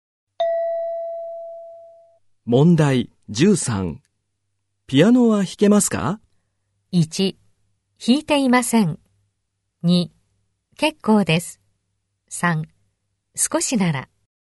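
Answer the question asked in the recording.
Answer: 3: 少しなら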